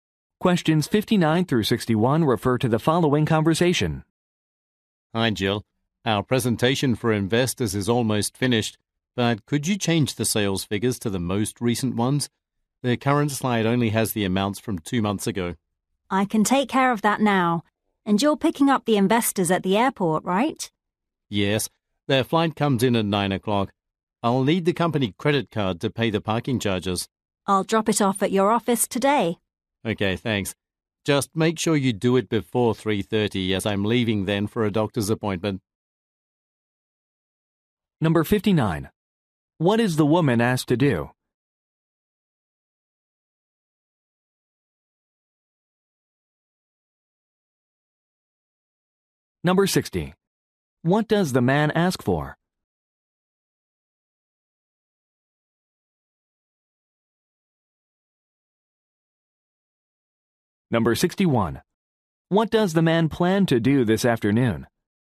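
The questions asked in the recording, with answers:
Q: What is the woman asked to do?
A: Update the sales figures

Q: What does the man ask for?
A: The company credit card

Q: What does the man plan to do this afternoon?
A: Go to a doctor's appointment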